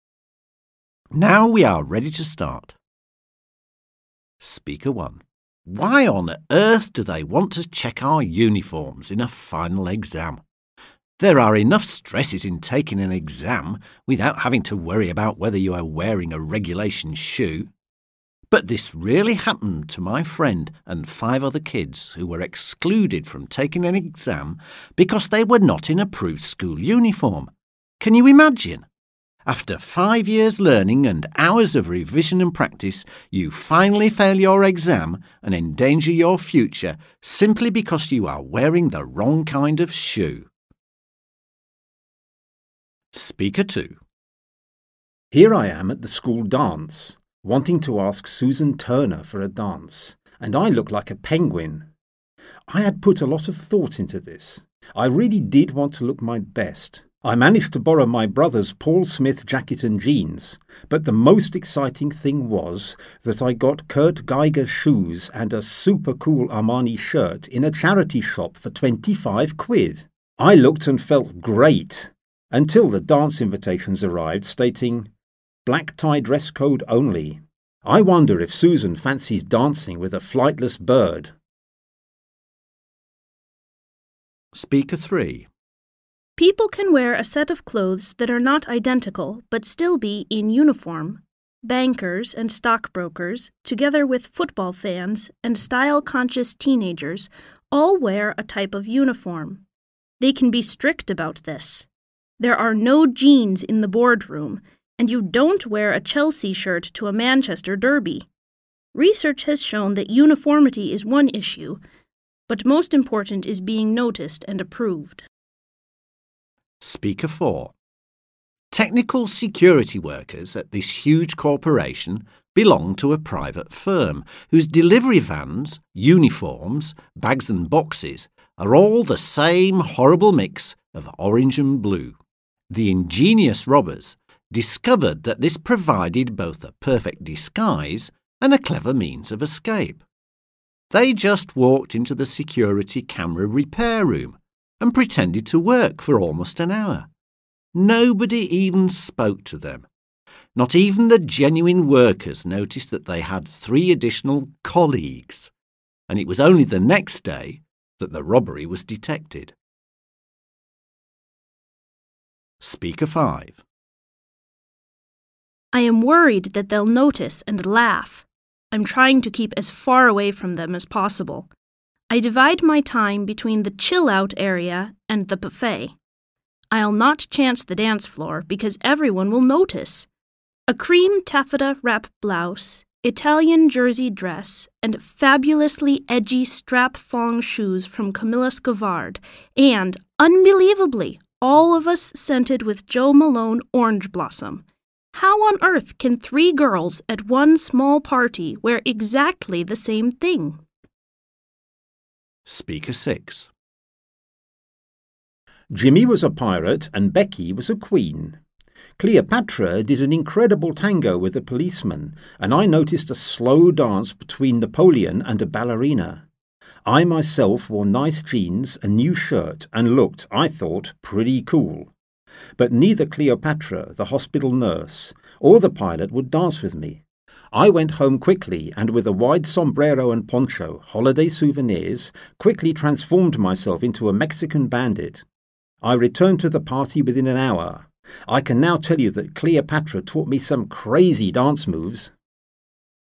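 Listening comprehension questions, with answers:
Вы услышите 6 высказываний. Установите соответствие между высказываниями каждого говорящего A–F и утверждениями, данными в списке 1–7. Используйте каждое утверждение, обозначенное соответствующей цифрой, только один раз. В задании есть одно лишнее утверждение. Вы услышите запись дважды.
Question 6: Uniforms are always dull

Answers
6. not used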